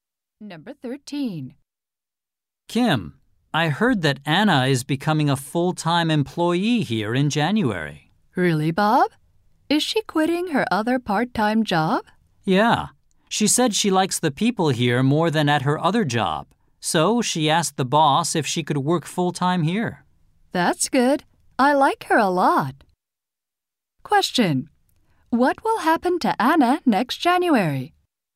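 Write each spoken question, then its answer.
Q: What will happen to Anna next January?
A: She will become a full-time employee.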